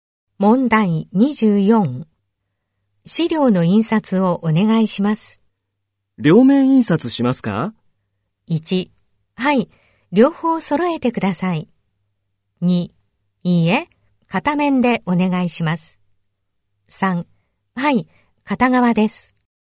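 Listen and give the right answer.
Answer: 2: いいえ、片面でお願いします。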